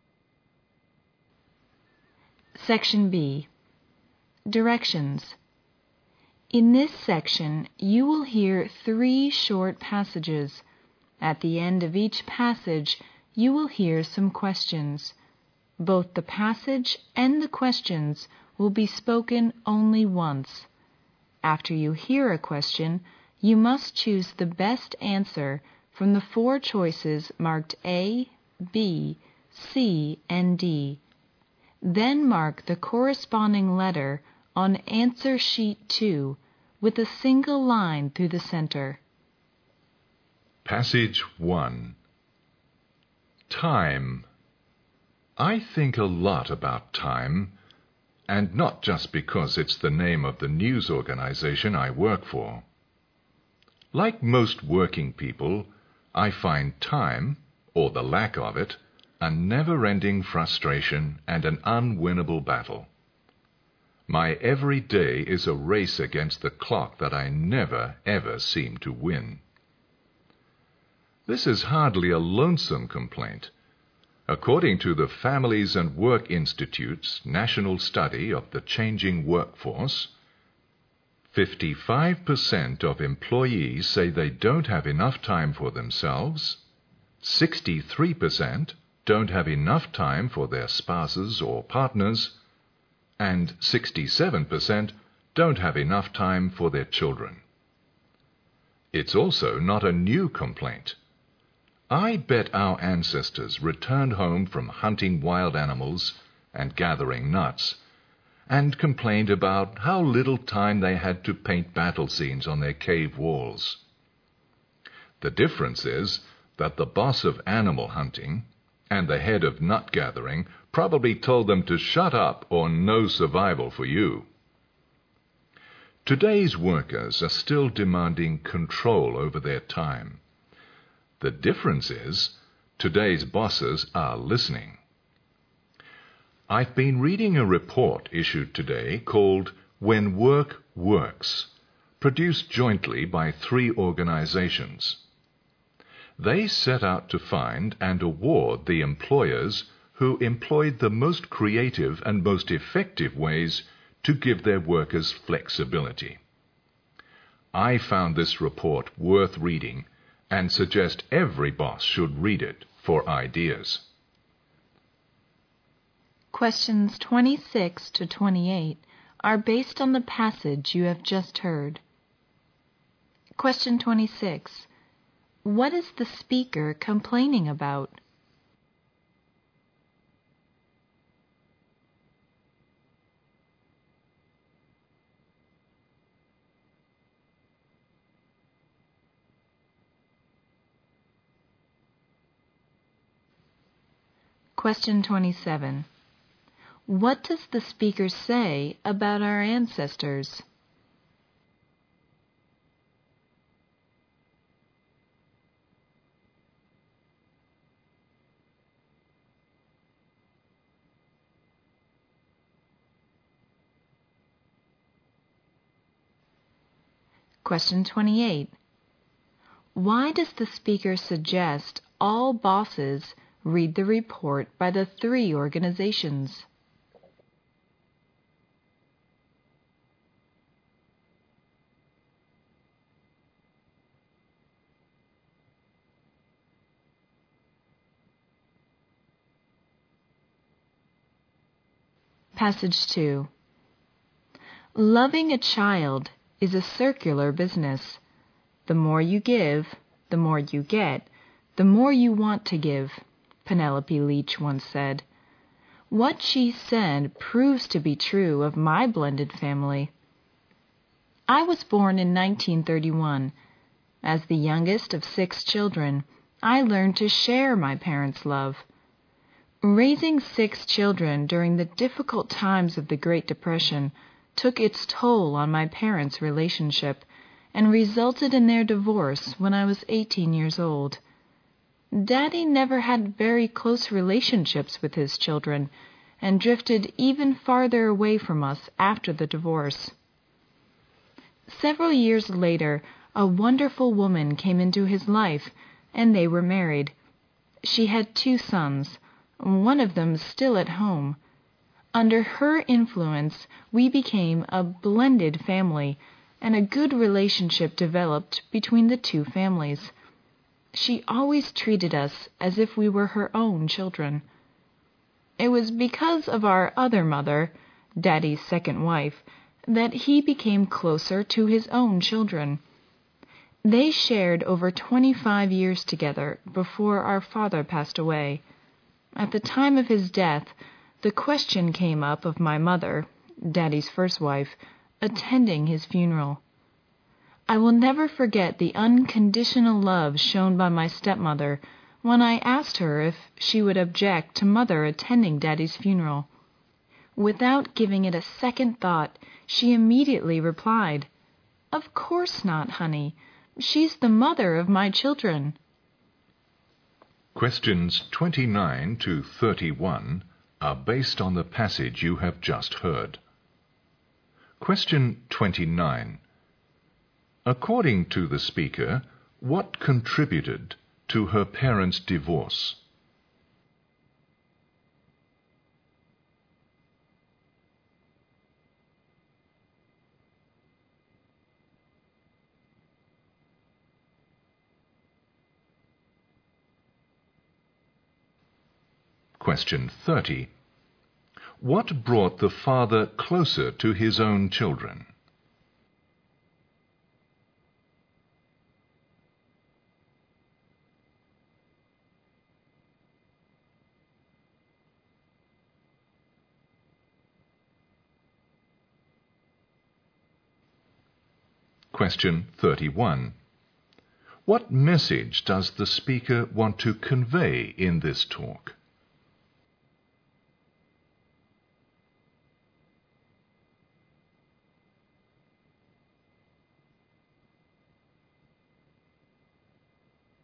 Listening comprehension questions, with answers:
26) What is the speaker complaining about?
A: He's in a hurry to work everyday and doesn't have enough spare time.

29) According to the speaker, what contributed to her parents' divorce?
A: The difficult time of the Great Depression

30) What brought his father closer to his children?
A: A wonderful woman, his stepmother

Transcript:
Time
I think a lot about time and not just because it's the name of the news organization I work for. Like most working people, I find time or the lack of it, are never ending frustration and an unwinable battle. My every day is a race against the clock that I never ever seem to win. This is hardly a lonesome complaint, according to the families and work institutes, national study of the changing work force, 55% of the employees say they don't have enough time for themselves, 63% don't have enough time for their spouses or partners, and 67% don't have enough time for their children. It's also not a new complaint. I bet our ancestors returned home from hunting wild animals and gathering nuts, and complained about how little time they had to paint battle scenes on their cave walls. The difference is that the boss of the animal hunting and the head of nut gathering probably told them to "Shut up!" or "No survival for you!" Today's workers are still demanding control over their time, the difference is: today's bosses are listening. I've been reading a report issued today called When Work Works, produced jointly by 3 organizations. They set out to find and award the employers who employ the most creative and most effective ways to give their workers flexibility. I found this report worth reading and suggest every boss should read it for ideas.
Questions 26 to 28 are based on the passage you have just heard.
He's in a hurry to work everyday and doesn't have enough spare time.
27. What does the speaker say about our ancestors?
Why does the speaker suggest all bosses read the report by the 3 organizations?
Because this report may help them keep their most creative and effective workers working without too much complaint.
Passage 2
Loving a child is a circular business. The more you give, the more you get. The more you want to give, Penalapy Leach once said. What she said proves to be true of my blended family. I was born in 1931as the youngest of 6 children, I learn to share my parents' love. Raising 6 children during the difficult times of the Great Depression took its toll on my parents' relationship and resulted in their divorce when I was 18 years old. Daddy never had very close relationships with his children and drifted even farther away from us after the divorce. Several years later, a wonderful woman came into his life, and they were married. She had 2 sons. One of them is still at home. Under her influence we became a blended family and a good relationship developed between the 2 families. She always treated us as if we were her own children. It was because of our other mother, daddy's second wife, that he became closer to his own children. They shared over 25 years together before our father passed away. At the time of his death, the question came up of my mother, daddy's first wife, attending his funeral. I will never forget the unconditional love shown by my stepmother, when I asked her if she would object to mother attending daddy's funeral. Without giving it a second thought, she immediately replied, "of course not, honey, she is the mother of my children."
Questions 29 to 31 are based on the passage you've just heard. www.hxen.com